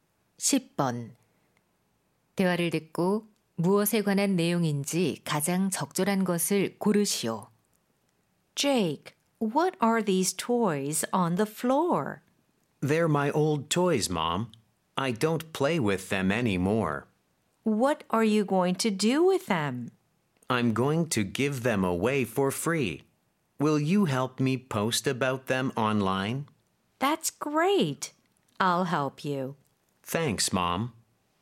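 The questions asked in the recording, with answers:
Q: 대화를 듣고 무엇에 관한 내용인지 가장 적절한 것을 고르시오.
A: 안 쓰는 장난감 무료 나눔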